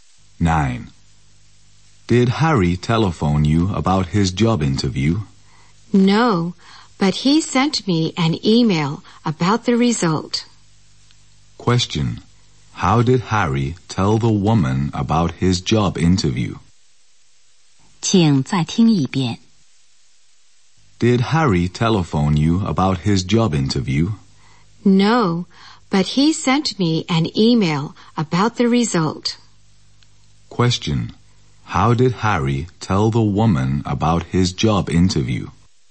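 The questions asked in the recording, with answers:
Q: How did Harry tell the woman about his job interview?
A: By email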